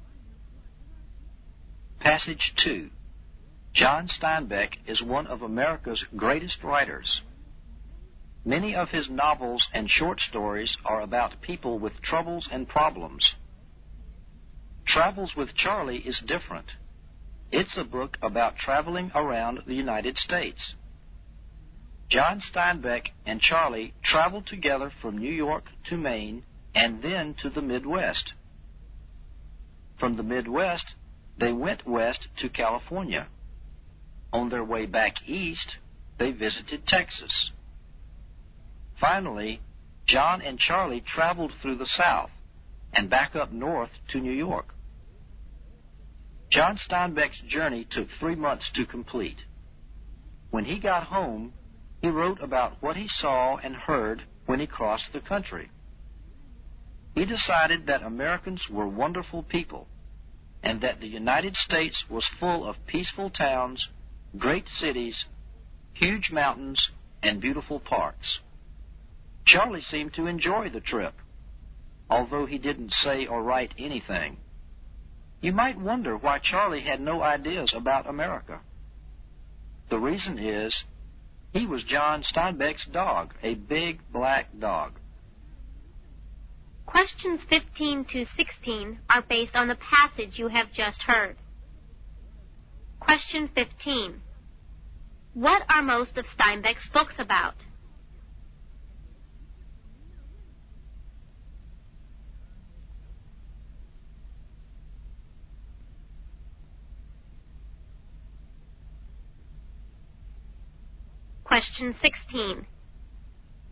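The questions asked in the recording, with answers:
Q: What are most of Steinbeck's books about?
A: People with troubles and problems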